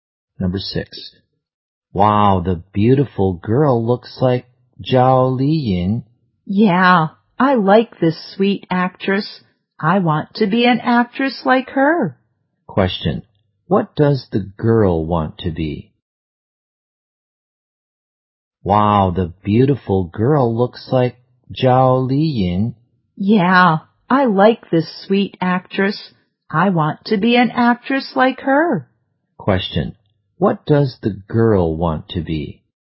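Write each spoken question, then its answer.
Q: Question, what does the girl want to be?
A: An actress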